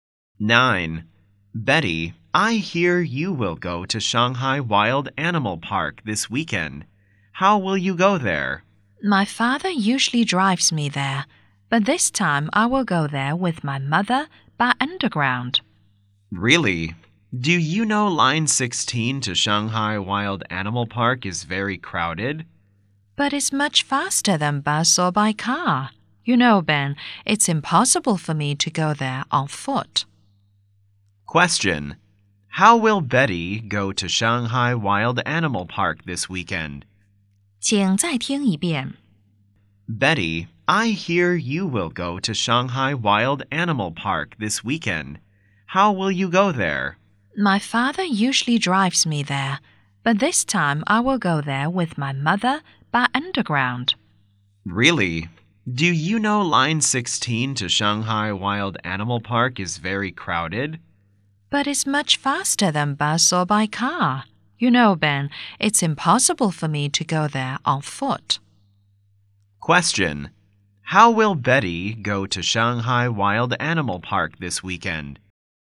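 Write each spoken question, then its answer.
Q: Question. How will Betty go to Shanghai Wild Animal Park this weekend?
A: By underground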